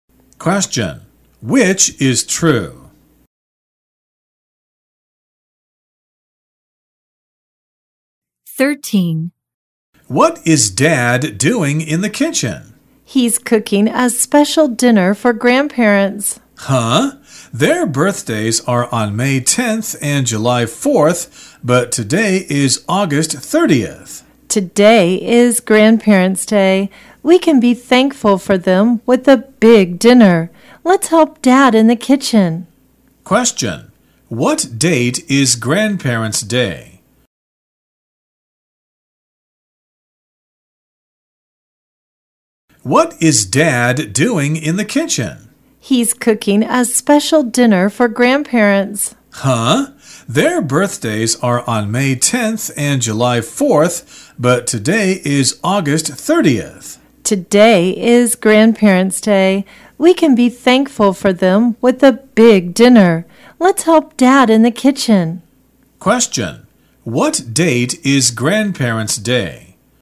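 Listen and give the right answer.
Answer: August 30th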